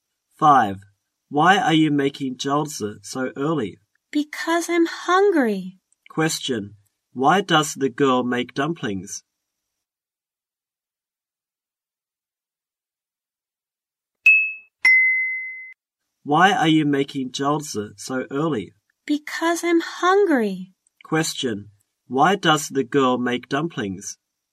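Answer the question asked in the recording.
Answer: Because she's hungry.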